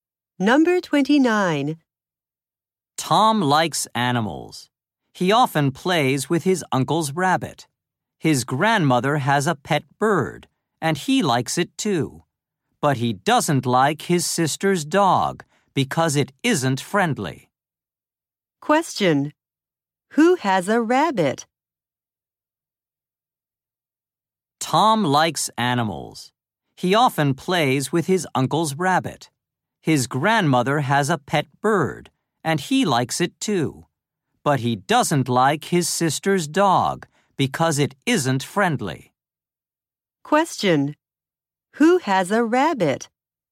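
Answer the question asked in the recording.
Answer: Tom's uncle.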